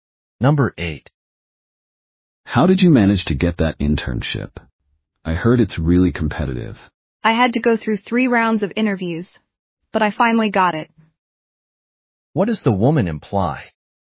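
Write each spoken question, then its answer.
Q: What does the woman imply?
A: Getting the internship was difficult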